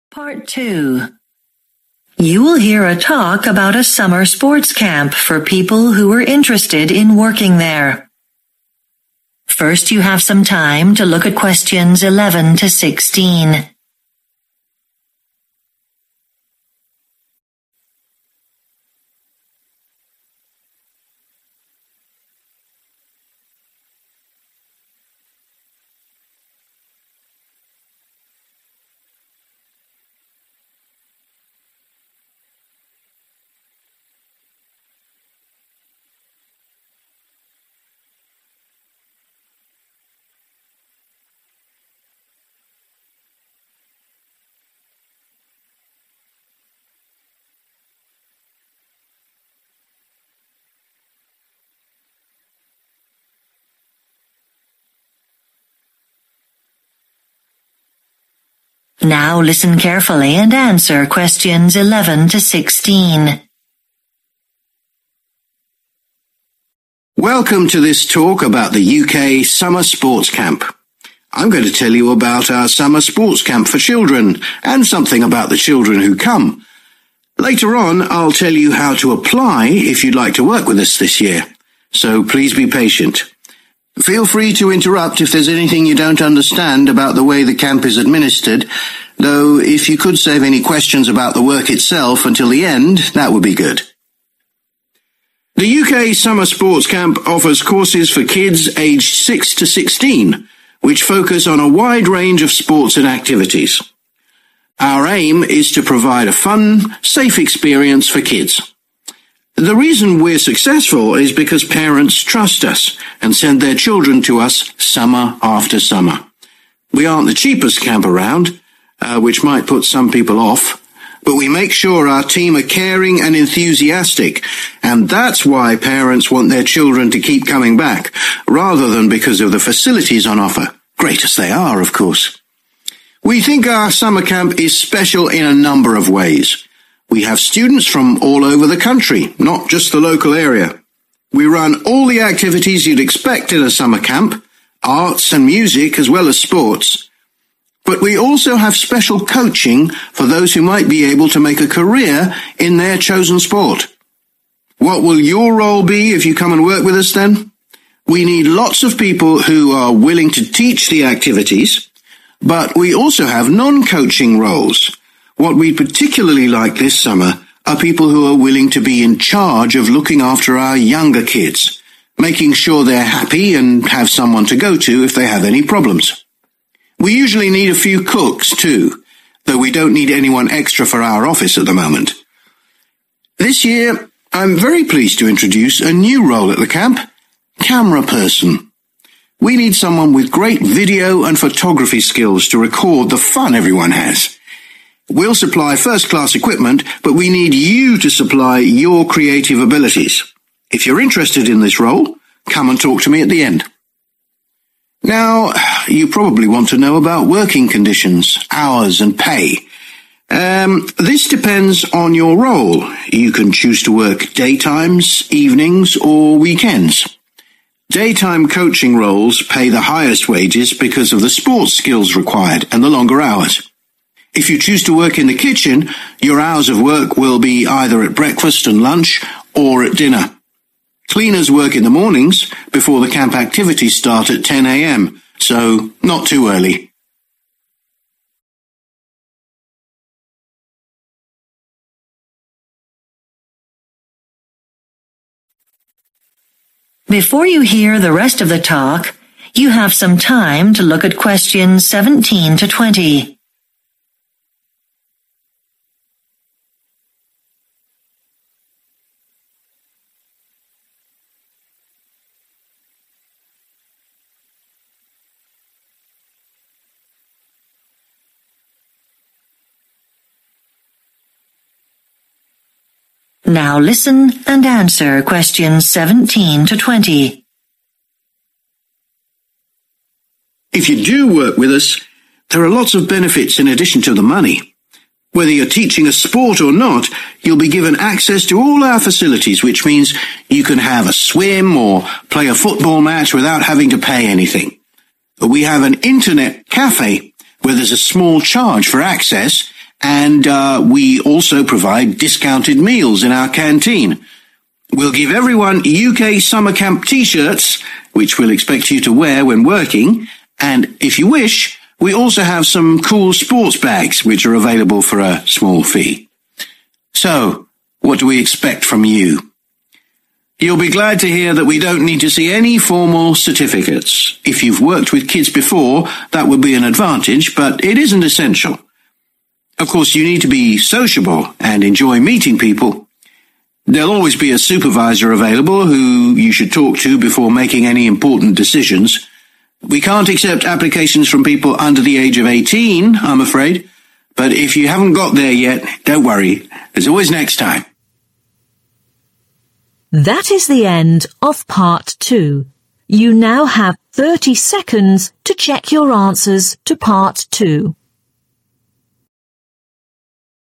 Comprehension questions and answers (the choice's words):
Choose the correct answer.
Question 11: The speaker says that he is happy to answer questions during his talk about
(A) the general operation of the camp.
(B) the children who attend.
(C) the job responsibilities.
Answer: the general operation of the camp.

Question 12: Why do parents send their children to the camp again and again?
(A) They like the fact that it is cheaper than other camps.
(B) They are pleased with the wide range of facilities on offer.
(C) They know their children will be looked after at the camp.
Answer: They know their children will be looked after at the camp.

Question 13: One special thing about this summer camp is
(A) the number of international students.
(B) the preparation for professional sports.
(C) the inclusion of non-sports activities.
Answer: the preparation for professional sports.

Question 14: The speaker says that this year, the camp particularly needs people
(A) who would like to work in the office.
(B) who have experience of cooking.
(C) who young children can talk to.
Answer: who young children can talk to.

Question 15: What should the new cameraperson have?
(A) artistic talents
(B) good camera equipment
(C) a qualification in photography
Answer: artistic talents

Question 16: What does the speaker say about working conditions?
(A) Sports coaches earn the most.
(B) Kitchen staff work the longest hours.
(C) Cleaners work in the mornings and evenings.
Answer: Sports coaches earn the most.